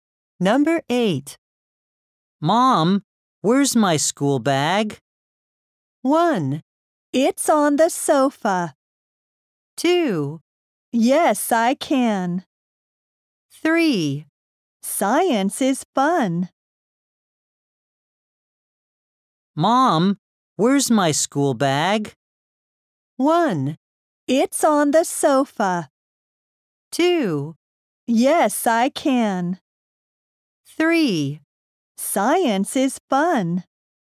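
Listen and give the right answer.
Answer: 1: It's on the sofa.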